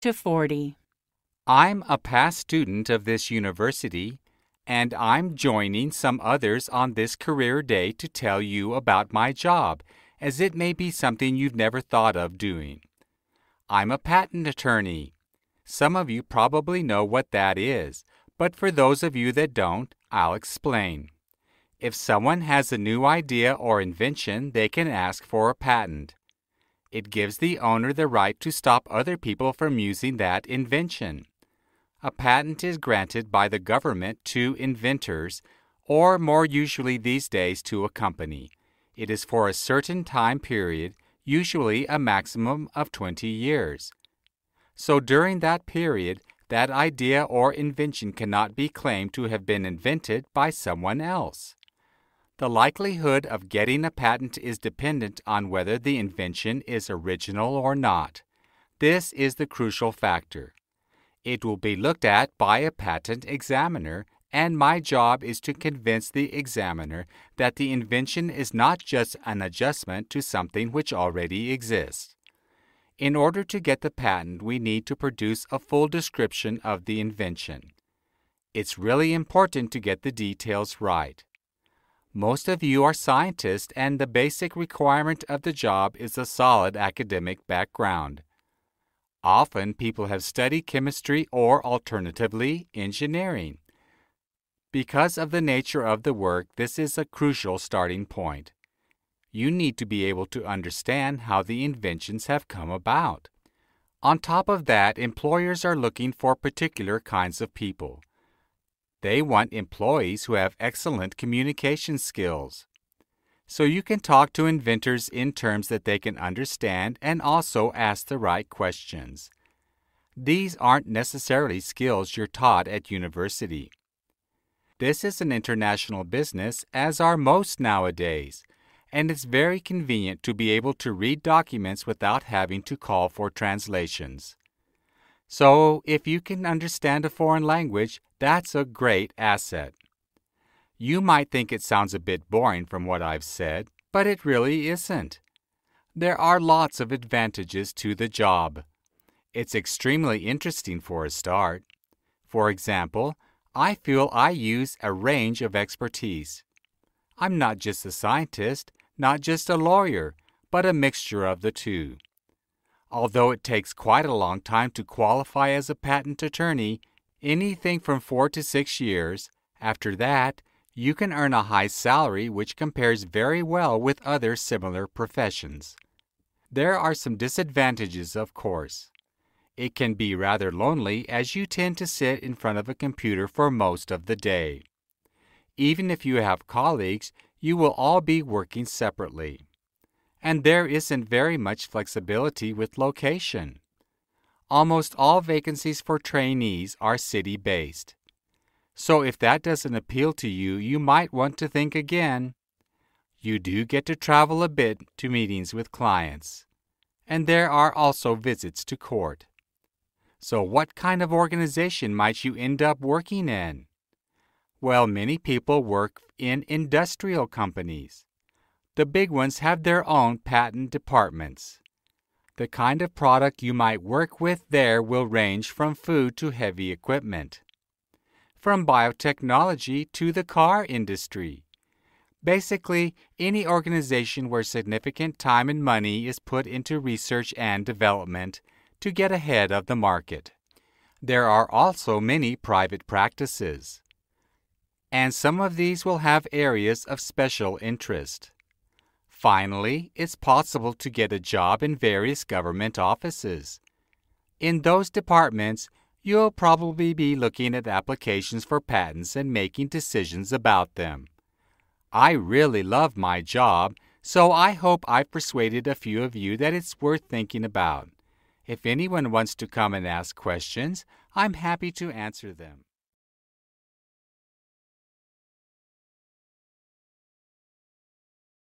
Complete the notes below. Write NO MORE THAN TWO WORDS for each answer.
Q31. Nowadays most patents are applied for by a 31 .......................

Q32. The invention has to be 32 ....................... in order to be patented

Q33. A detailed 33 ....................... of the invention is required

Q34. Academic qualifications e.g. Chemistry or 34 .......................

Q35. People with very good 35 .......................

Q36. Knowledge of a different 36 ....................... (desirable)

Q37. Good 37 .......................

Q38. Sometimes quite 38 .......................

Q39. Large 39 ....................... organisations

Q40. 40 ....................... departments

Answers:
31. company
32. original
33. description
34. engineering
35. communication
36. language
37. salary
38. lonely
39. industrial
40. government